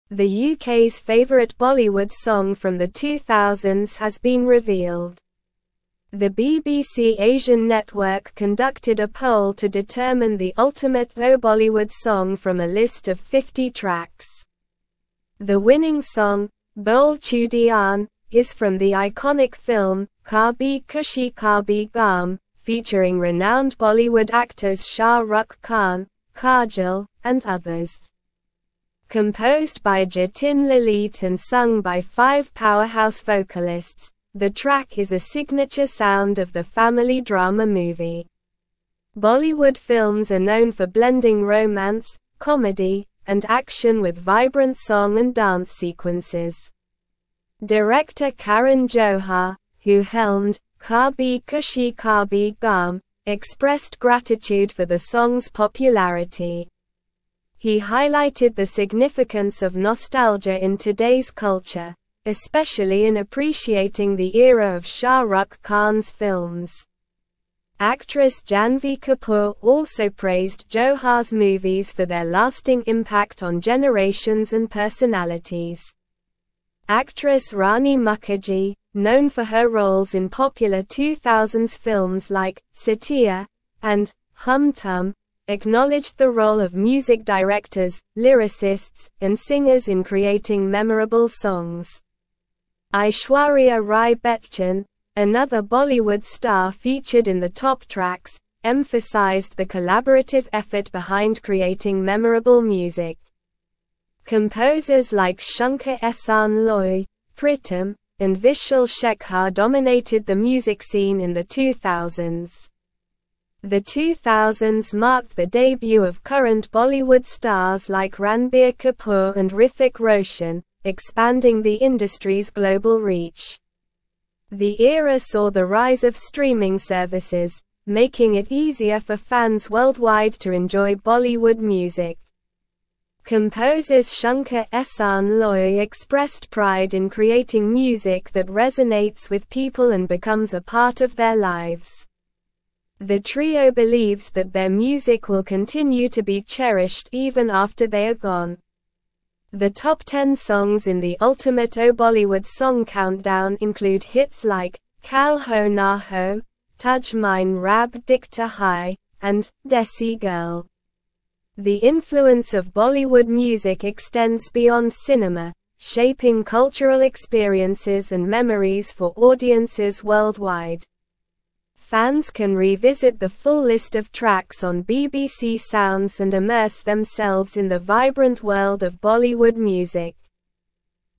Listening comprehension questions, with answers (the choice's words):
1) Which Bollywood song from the 2000s was voted as the UK's favorite in a recent poll?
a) Kal Ho Naa Ho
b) Tujh Mein Rab Dikhta Hai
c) Bole Chudiyan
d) Desi Girl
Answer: Bole Chudiyan

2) Who composed the winning song "Bole Chudiyan" from the film "Kabhi Khushi Kabhie Gham"?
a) Shankar-Ehsaan-Loy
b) Jatin-Lalit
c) Pritam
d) Vishal-Shekhar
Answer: Jatin-Lalit

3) Which director helmed the iconic film "Kabhi Khushi Kabhie Gham"?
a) Sanjay Leela Bhansali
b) Karan Johar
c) Yash Chopra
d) Aditya Chopra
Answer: Karan Johar

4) Which Bollywood actress praised Karan Johar's movies for their lasting impact on generations and personalities?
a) Rani Mukerji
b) Aishwarya Rai Bachchan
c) Janhvi Kapoor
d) Kajol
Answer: Janhvi Kapoor

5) Who are some of the composers that dominated the music scene in the 2000s according to the article?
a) Shankar-Ehsaan-Loy, Pritam, Vishal-Shekhar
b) A.R. Rahman, Anu Malik, Himesh Reshammiya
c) Amit Trivedi, Mithoon, Salim-Sulaiman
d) Nadeem-Shravan, Jatin-Lalit, Viju Shah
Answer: Shankar-Ehsaan-Loy, Pritam, Vishal-Shekhar

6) Which Bollywood stars made their debut in the 2000s, expanding the industry's global reach?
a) Shah Rukh Khan and Salman Khan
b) Aamir Khan and Akshay Kumar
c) Amitabh Bachchan and Ajay Devgn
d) Ranbir Kapoor and Hrithik Roshan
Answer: Ranbir Kapoor and Hrithik Roshan

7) How did the rise of streaming services impact the global reach of Bollywood music in the 2000s?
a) Made it easier for fans worldwide to enjoy Bollywood music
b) Restricted access to Bollywood music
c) Decreased interest in Bollywood music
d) Limited the distribution of Bollywood music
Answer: Made it easier for fans worldwide to enjoy Bollywood music

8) What are some of the top songs in the Ultimate 00s Bollywood song countdown mentioned in the article?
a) Chaiyya Chaiyya, Kajra Re, Dola Re Dola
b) Tum Hi Ho, Lungi Dance, Gerua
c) Ghungroo, Malang, Garmi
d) Kal Ho Naa Ho, Tujh Mein Rab Dikhta Hai, Desi Girl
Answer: Kal Ho Naa Ho, Tujh Mein Rab Dikhta Hai, Desi Girl

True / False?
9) The song was composed by Jatin-Lalit and sung by five vocalists.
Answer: True

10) Aishwarya Rai Bachchan downplayed the collaborative effort behind creating memorable music in Bollywood.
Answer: False

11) Actress Janhvi Kapoor praised Karan Johar's movies for their lasting impact on generations.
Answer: True

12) Composers Shankar-Ehsaan-Loy expressed regret in creating music that resonates with people and becomes a part of their lives.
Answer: False

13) 1. "Bole Chudiyan" from the film "Kabhi Khushi Kabhie Gham" was voted as the UK's favorite Bollywood song from the 2000s.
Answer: True

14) The 2000s saw the rise of Bollywood stars like Ranbir Kapoor and Hrithik Roshan, limiting the industry's global reach.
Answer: False

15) Director Karan Johar, who directed "Kabhi Khushi Kabhie Gham," expressed gratitude for the song's popularity.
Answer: True

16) Rani Mukerji disregarded the contribution of music directors, lyricists, and singers in creating memorable songs in the 2000s.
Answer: False

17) The BBC Asian Network conducted a poll to determine the Ultimate 00s Bollywood song from a list of 50 (1)______.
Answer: tracks

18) The winning song, "Bole Chudiyan," is from the (2)______ film "Kabhi Khushi (3)______ Gham"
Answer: iconic

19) The winning song, "Bole Chudiyan," is from the (2)______ film "Kabhi Khushi (3)______ Gham"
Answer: Kabhie

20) Bollywood films are known for blending romance, (4)______, and action with vibrant song and dance sequences.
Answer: comedy

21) Director (5)______ Johar, who helmed "Kabhi Khushi Kabhie Gham," expressed gratitude for the song's popularity.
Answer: Karan

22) Actress Janhvi Kapoor also praised Johar's (6)______ for their lasting impact on generations and (7)______.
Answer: movies

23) Actress Janhvi Kapoor also praised Johar's (6)______ for their lasting impact on generations and (7)______.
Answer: personalities

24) Actress Rani Mukerji, known for her (8)______ in popular 2000s films like "Saathiya" and "Hum Tum,"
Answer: roles

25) Aishwarya Rai Bachchan, another Bollywood star (9)______ in the top tracks, (10)______ the (11)______ effort behind creating memorable music.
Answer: featured

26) Aishwarya Rai Bachchan, another Bollywood star (9)______ in the top tracks, (10)______ the (11)______ effort behind creating memorable music.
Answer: emphasized

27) Aishwarya Rai Bachchan, another Bollywood star (9)______ in the top tracks, (10)______ the (11)______ effort behind creating memorable music.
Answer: collaborative

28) The era saw the rise of streaming (12)______, making it easier for fans worldwide to enjoy Bollywood music.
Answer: services

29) Composers Shankar-Ehsaan-Loy expressed pride in creating music that resonates with people and becomes a part of their (13)______.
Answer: lives

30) The trio believes that their music will continue to be (14)______ even after they are gone.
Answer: cherished

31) The top 10 songs in the Ultimate 00s Bollywood song (15)______ include hits like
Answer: countdown

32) The influence of Bollywood music extends beyond cinema, shaping cultural experiences and (16)______ for audiences worldwide.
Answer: memories

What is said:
The UK's favorite Bollywood song from the 2000s has been revealed. The BBC Asian Network conducted a poll to determine the Ultimate 00s Bollywood song from a list of 50 tracks. The winning song, "Bole Chudiyan," is from the iconic film "Kabhi Khushi Kabhie Gham" featuring renowned Bollywood actors Shah Rukh Khan, Kajol, and others. Composed by Jatin-Lalit and sung by five powerhouse vocalists, the track is a signature sound of the family drama movie.
Bollywood films are known for blending romance, comedy, and action with vibrant song and dance sequences. Director Karan Johar, who helmed "Kabhi Khushi Kabhie Gham," expressed gratitude for the song's popularity. He highlighted the significance of nostalgia in today's culture, especially in appreciating the era of Shah Rukh Khan's films. Actress Janhvi Kapoor also praised Johar's movies for their lasting impact on generations and personalities.
Actress Rani Mukerji, known for her roles in popular 2000s films like "Saathiya" and "Hum Tum," acknowledged the role of music directors, lyricists, and singers in creating memorable songs. Aishwarya Rai Bachchan, another Bollywood star featured in the top tracks, emphasized the collaborative effort behind creating memorable music. Composers like Shankar-Ehsaan-Loy, Pritam, and Vishal-Shekhar dominated the music scene in the 2000s.
The 2000s marked the debut of current Bollywood stars like Ranbir Kapoor and Hrithik Roshan, expanding the industry's global reach. The era saw the rise of streaming services, making it easier for fans worldwide to enjoy Bollywood music. Composers Shankar-Ehsaan-Loy expressed pride in creating music that resonates with people and becomes a part of their lives. The trio believes that their music will continue to be cherished even after they are gone.
The top 10 songs in the Ultimate 00s Bollywood song countdown include hits like "Kal Ho Naa Ho," "Tujh Mein Rab Dikhta Hai," and "Desi Girl." The influence of Bollywood music extends beyond cinema, shaping cultural experiences and memories for audiences worldwide. Fans can revisit the full list of tracks on BBC Sounds and immerse themselves in the vibrant world of Bollywood music.

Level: Level 4